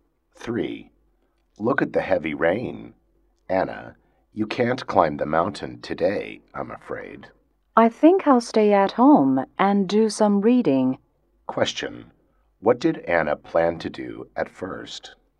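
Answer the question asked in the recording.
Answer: Climb the mountain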